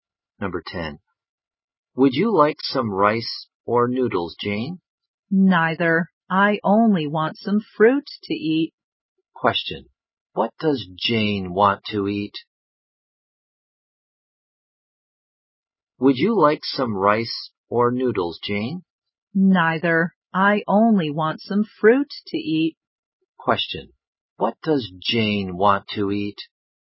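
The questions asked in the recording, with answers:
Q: Question. What does Jane want to eat?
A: Some fruit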